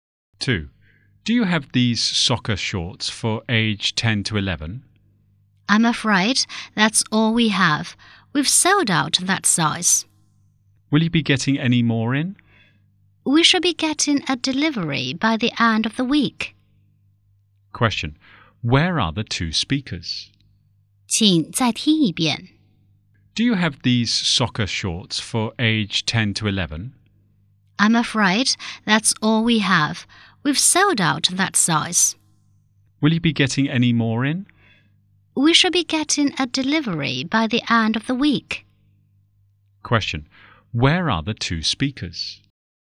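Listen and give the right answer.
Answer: In a clothes/sports shop.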